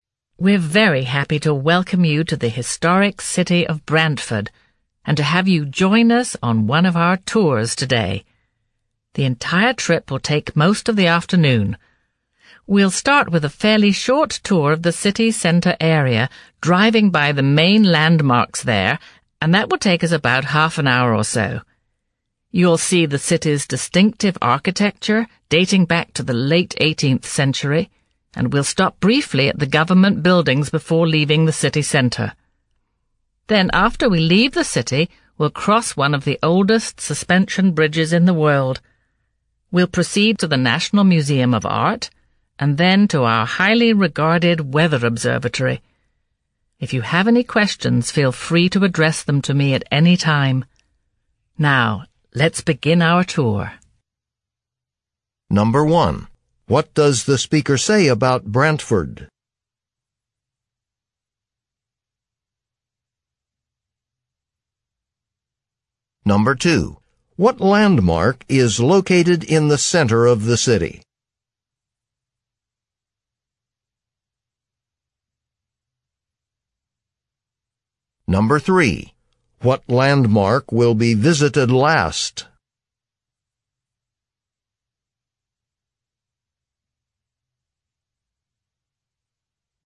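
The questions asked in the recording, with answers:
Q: What landmark is located in the center of the city?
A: The government buildings

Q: What landmark will be visited last?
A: The weather observatory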